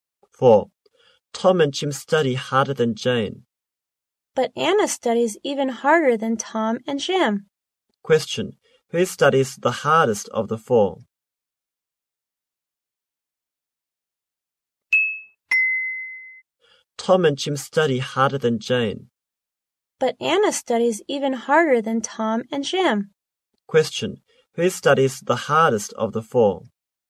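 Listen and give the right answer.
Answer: Anna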